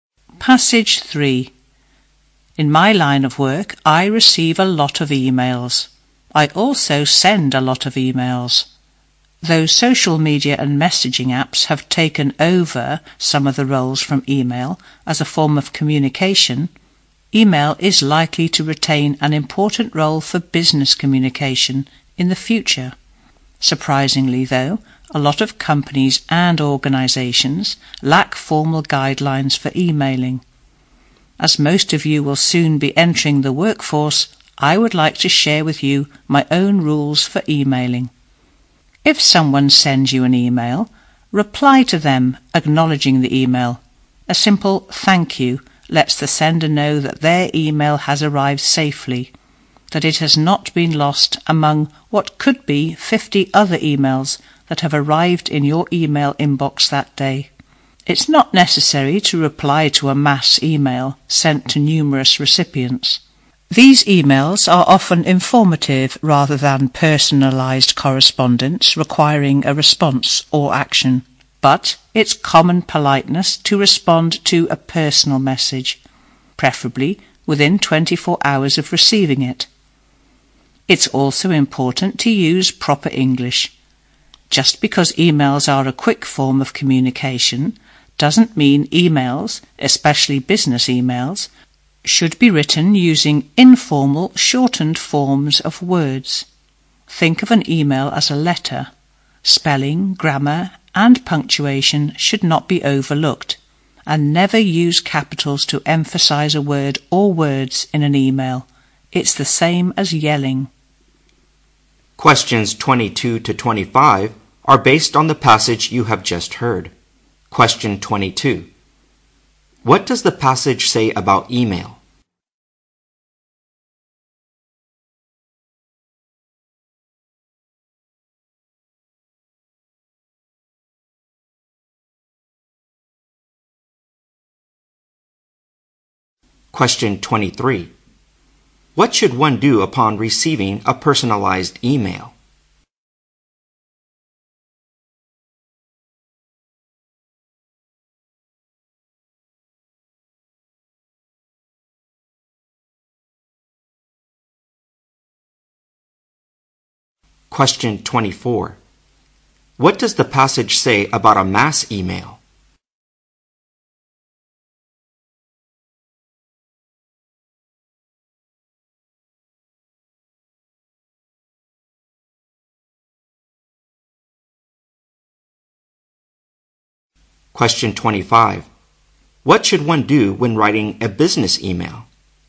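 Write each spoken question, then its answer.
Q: What does the passage say about email?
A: It will probably keep an important role in business communication.

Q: What should one do upon receiving a personalized email?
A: Reply to acknowledge it, preferably within 24 hours.

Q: What does the passage say about a mass email?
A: It is not necessary to reply to it.

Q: What should one do when writing a business email?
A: Use proper English, with correct spelling, grammar and punctuation.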